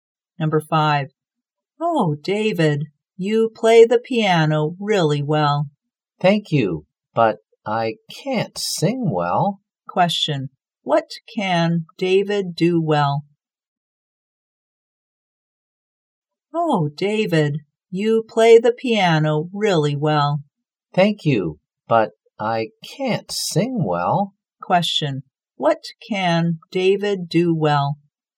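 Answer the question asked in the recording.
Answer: Play the piano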